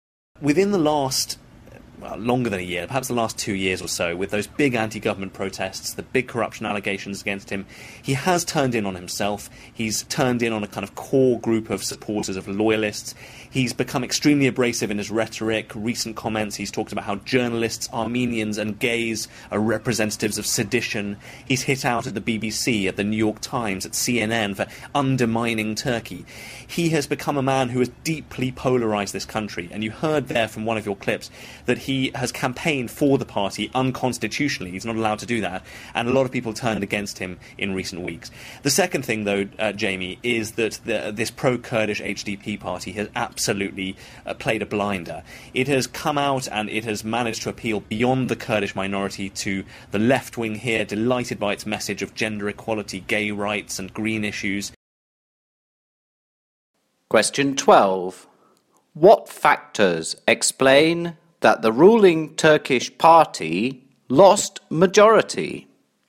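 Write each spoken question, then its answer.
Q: What factors explain that the ruling Turkish party lost majority?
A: The leader became polarising and campaigned unconstitutionally, and the HDP appealed beyond Kurds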